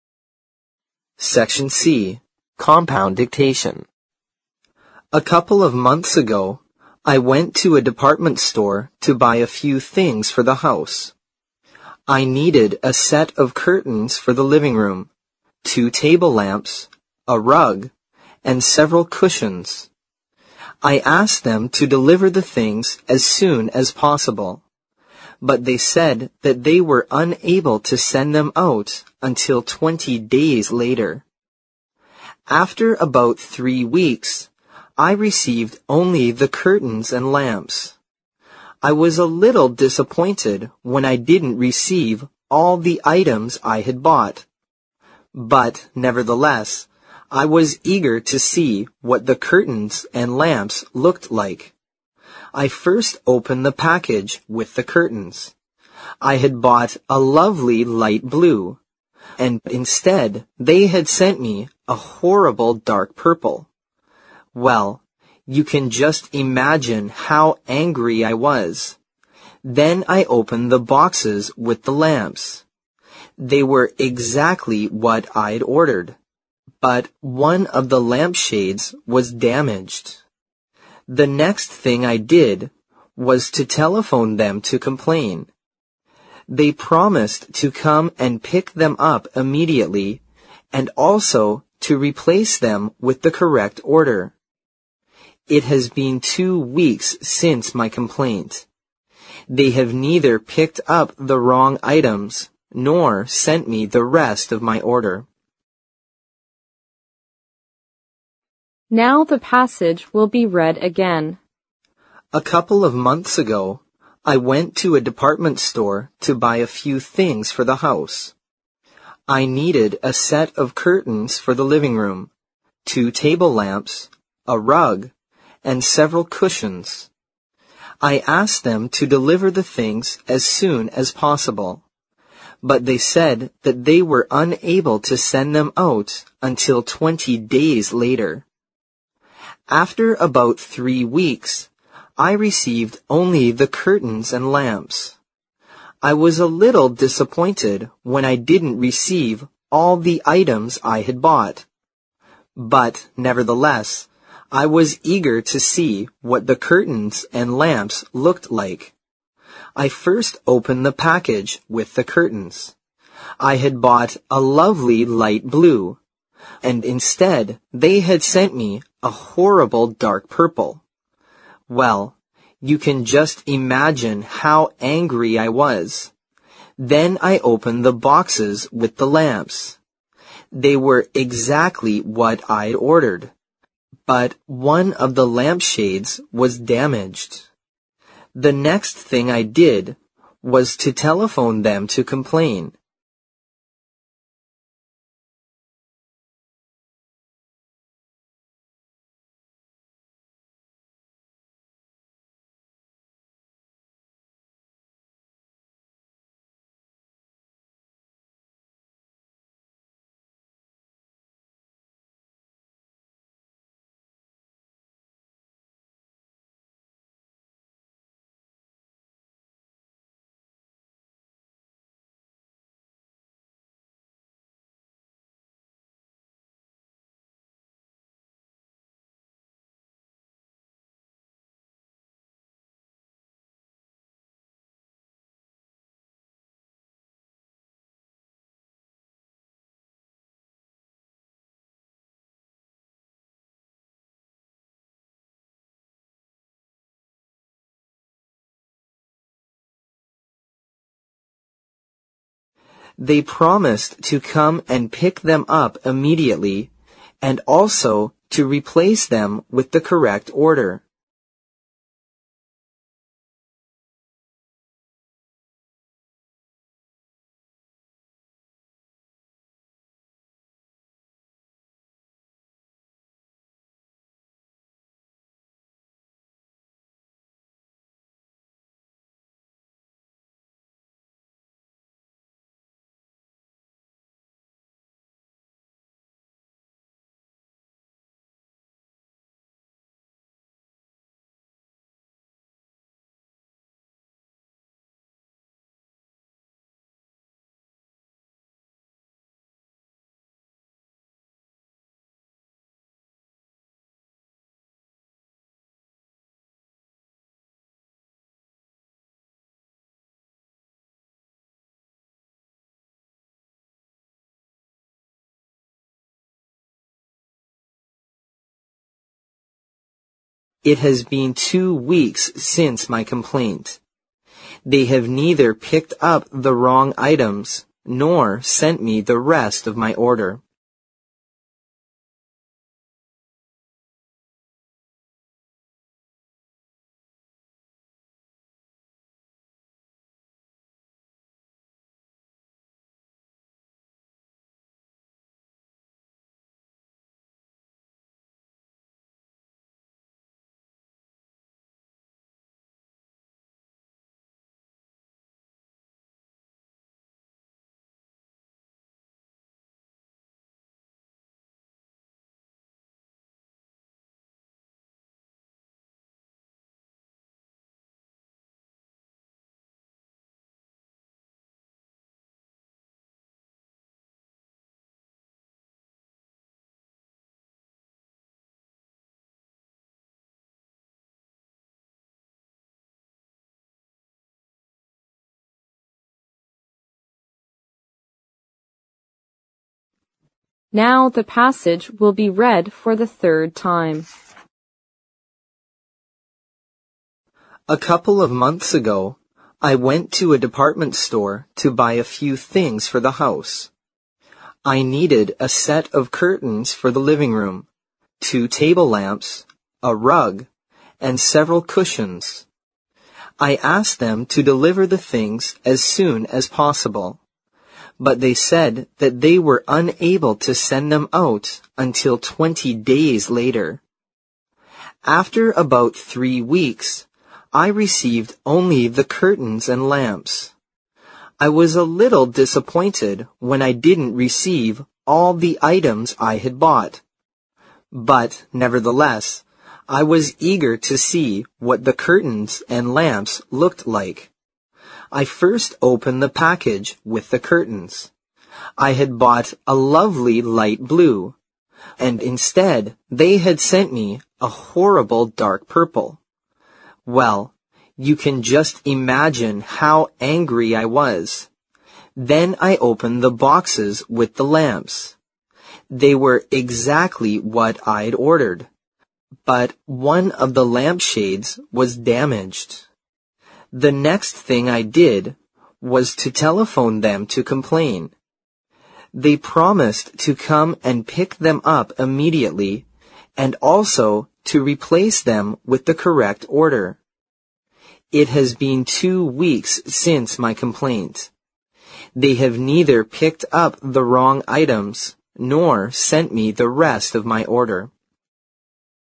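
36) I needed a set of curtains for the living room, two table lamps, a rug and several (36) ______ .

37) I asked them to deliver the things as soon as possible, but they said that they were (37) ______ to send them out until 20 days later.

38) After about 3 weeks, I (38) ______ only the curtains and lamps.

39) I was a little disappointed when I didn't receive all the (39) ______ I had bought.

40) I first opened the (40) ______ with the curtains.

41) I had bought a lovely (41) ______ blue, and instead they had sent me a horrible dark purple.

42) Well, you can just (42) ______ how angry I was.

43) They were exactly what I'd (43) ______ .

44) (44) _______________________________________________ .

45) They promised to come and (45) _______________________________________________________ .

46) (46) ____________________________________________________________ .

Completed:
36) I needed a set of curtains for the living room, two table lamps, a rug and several cushions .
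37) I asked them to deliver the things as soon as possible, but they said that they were unable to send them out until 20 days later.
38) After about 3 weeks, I received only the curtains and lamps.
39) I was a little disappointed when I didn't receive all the items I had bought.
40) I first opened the package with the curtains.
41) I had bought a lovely light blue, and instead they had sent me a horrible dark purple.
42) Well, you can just imagine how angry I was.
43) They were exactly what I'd ordered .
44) The next thing I did was to telephone them to complain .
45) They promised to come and pick them up immediately and also to replace them with the correct order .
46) They have neither picked up the wrong items nor sent me the rest of my order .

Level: 四级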